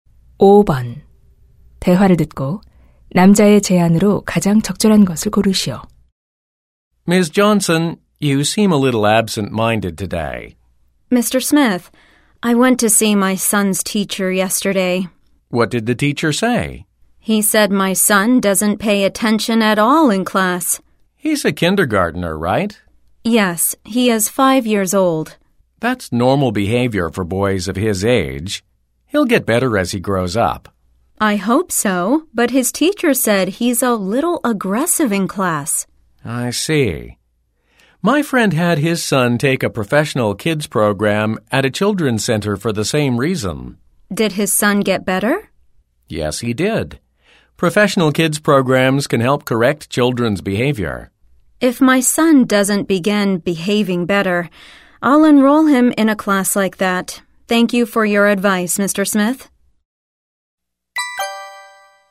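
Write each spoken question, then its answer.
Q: 대화를 듣고 남자의 제안으로 가장 적절한 것을 고르시오.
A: 아들에게 전문 아동 프로그램을 받게 해라.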